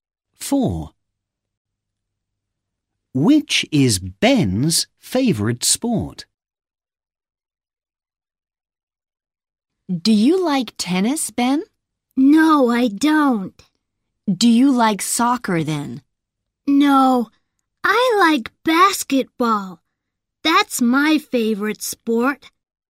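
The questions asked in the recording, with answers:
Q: Which is Ben's favourite sport?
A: basketball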